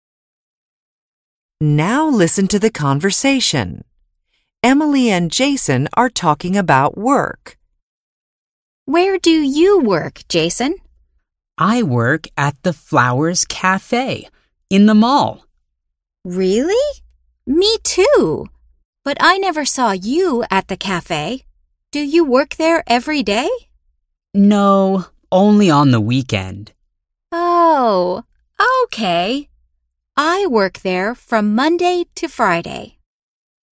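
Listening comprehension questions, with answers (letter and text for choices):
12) Emily _______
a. works at a café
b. never goes to the mall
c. works every weekend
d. goes to the mall every day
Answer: a. works at a café

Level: BEGINNERS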